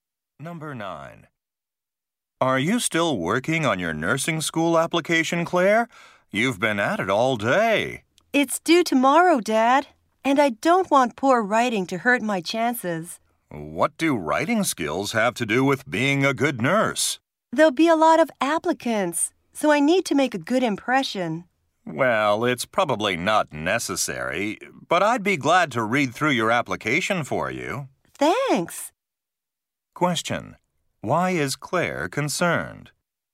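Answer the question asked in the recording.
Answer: She is worried that poor writing will hurt her chances of getting into nursing school.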